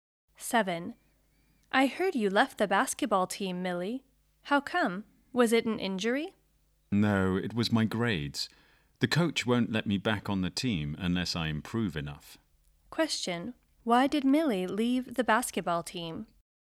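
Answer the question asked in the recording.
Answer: Because of her poor grades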